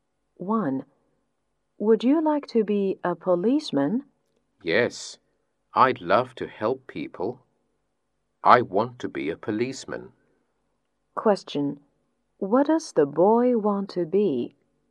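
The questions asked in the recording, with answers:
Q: What does the boy want to be?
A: A policeman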